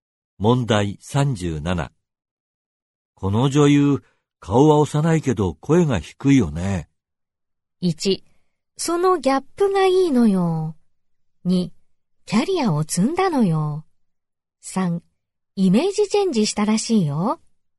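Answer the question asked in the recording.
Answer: 1: そのギャップがいいのよ。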